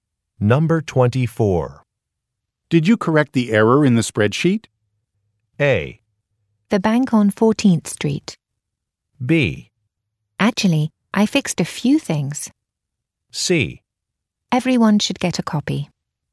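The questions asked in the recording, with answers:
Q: Did you correct the error in the spreadsheet?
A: B: Actually, I fixed a few things.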